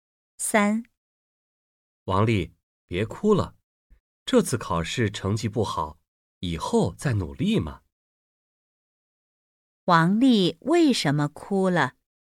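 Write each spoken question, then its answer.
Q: 王丽为什么哭了?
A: 考试成绩不好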